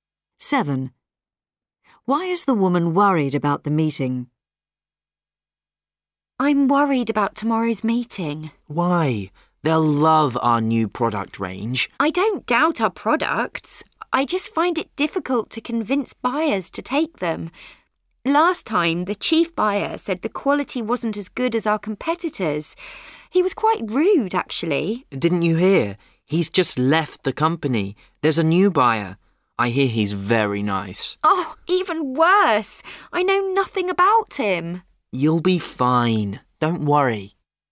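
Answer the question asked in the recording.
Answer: She knows nothing about the new buyer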